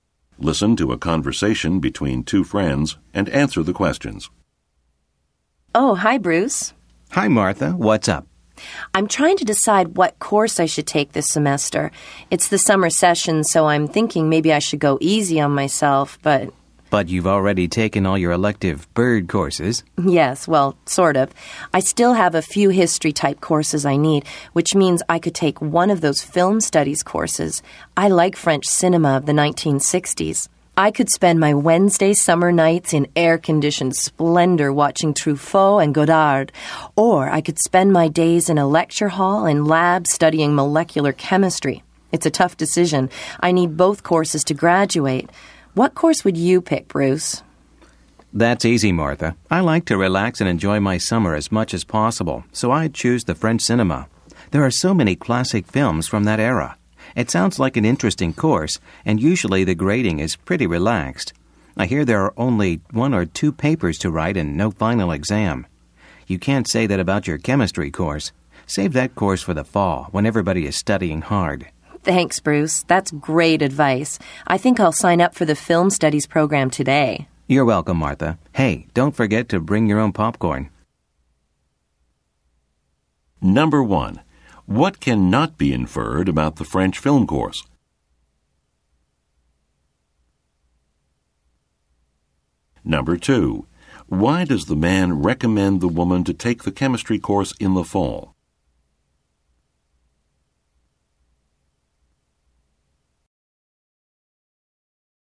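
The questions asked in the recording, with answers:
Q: Why does the man recommend the woman to take the chemistry course in the fall?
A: Because the fall is when everybody studies hard, and summer should be for relaxing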